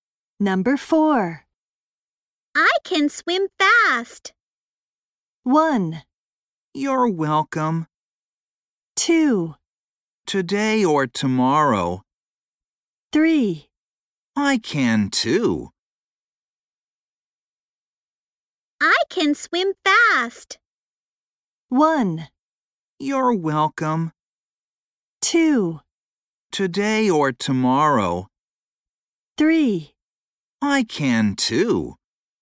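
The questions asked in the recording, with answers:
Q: I can swim fast.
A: 3: I can too.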